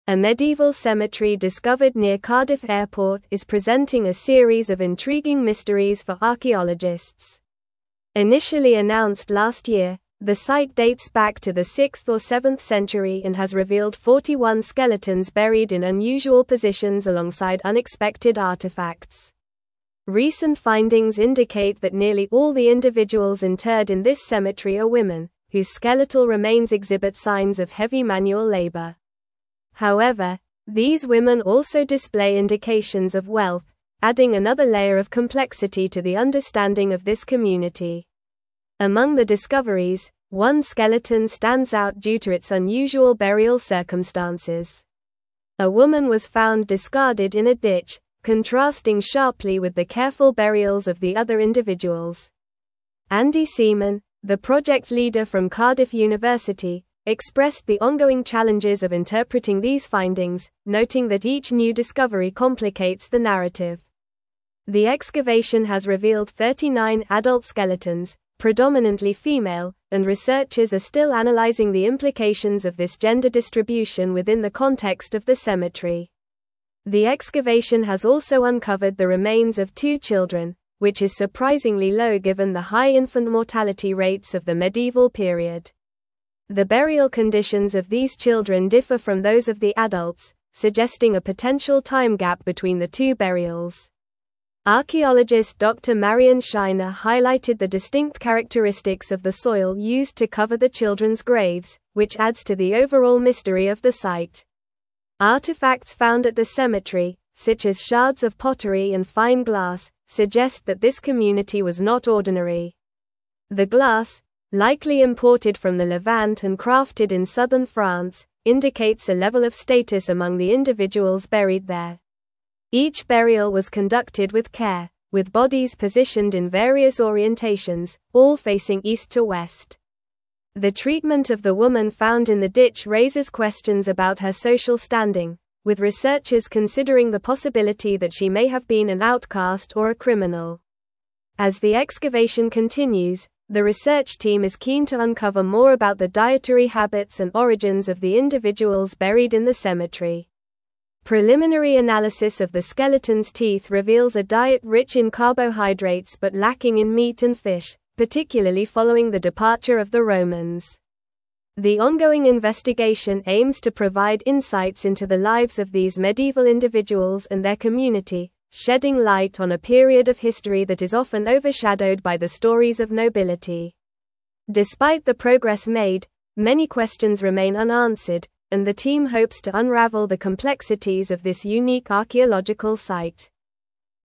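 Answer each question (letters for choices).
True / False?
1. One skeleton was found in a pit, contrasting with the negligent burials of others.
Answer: False

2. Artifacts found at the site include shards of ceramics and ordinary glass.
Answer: False

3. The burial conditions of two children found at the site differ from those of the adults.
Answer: True

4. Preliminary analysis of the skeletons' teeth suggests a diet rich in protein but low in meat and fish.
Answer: False

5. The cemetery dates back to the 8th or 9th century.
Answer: False

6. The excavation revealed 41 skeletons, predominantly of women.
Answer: True

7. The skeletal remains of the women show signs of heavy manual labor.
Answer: True

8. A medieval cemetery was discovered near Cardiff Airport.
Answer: True

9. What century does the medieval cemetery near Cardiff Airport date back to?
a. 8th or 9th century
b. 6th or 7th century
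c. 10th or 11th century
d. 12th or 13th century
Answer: b

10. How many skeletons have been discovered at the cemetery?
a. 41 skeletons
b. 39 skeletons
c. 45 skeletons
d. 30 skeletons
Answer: a

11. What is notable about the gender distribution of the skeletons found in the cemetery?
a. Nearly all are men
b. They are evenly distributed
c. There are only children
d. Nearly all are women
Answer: d

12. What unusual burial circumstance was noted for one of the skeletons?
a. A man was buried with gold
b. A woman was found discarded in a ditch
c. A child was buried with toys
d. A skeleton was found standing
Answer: b

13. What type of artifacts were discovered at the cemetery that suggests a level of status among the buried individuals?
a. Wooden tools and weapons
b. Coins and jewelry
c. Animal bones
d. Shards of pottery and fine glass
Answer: d

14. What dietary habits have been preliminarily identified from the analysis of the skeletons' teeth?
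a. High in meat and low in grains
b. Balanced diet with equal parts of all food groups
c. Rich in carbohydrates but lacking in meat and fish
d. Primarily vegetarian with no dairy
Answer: c

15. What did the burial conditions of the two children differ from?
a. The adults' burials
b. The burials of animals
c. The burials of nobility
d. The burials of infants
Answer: a

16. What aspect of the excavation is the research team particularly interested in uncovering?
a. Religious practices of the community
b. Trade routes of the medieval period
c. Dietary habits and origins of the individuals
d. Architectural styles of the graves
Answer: c

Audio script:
A medieval cemetery discovered near Cardiff Airport is presenting a series of intriguing mysteries for archaeologists. Initially announced last year, the site dates back to the 6th or 7th century and has revealed 41 skeletons buried in unusual positions alongside unexpected artifacts. 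Recent findings indicate that nearly all the individuals interred in this cemetery are women, whose skeletal remains exhibit signs of heavy manual labor. However, these women also display indications of wealth, adding another layer of complexity to the understanding of this community.
Among the discoveries, one skeleton stands out due to its unusual burial circumstances. A woman was found discarded in a ditch, contrasting sharply with the careful burials of the other individuals. Andy Seaman, the project leader from Cardiff University, expressed the ongoing challenges of interpreting these findings, noting that each new discovery complicates the narrative. The excavation has revealed 39 adult skeletons, predominantly female, and researchers are still analyzing the implications of this gender distribution within the context of the cemetery.
The excavation has also uncovered the remains of two children, which is surprisingly low given the high infant mortality rates of the medieval period. 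The burial conditions of these children differ from those of the adults, suggesting a potential time gap between the two burials. Archaeologist Dr. Marion Shiner highlighted the distinct characteristics of the soil used to cover the children's graves, which adds to the overall mystery of the site.
Artifacts found at the cemetery, such as shards of pottery and fine glass, suggest that this community was not ordinary. The glass, likely imported from the Levant and crafted in southern France, indicates a level of status among the individuals buried there. Each burial was conducted with care, with bodies positioned in various orientations, all facing east to west. The treatment of the woman found in the ditch raises questions about her social standing, with researchers considering the possibility that she may have been an outcast or a criminal.
As the excavation continues, the research team is keen to uncover more about the dietary habits and origins of the individuals buried in the cemetery. 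Preliminary analysis of the skeletons' teeth reveals a diet rich in carbohydrates but lacking in meat and fish, particularly following the departure of the Romans. The ongoing investigation aims to provide insights into the lives of these medieval individuals and their community, shedding light on a period of history that is often overshadowed by the stories of nobility. Despite the progress made, many questions remain unanswered, and the team hopes to unravel the complexities of this unique archaeological site.

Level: Level 4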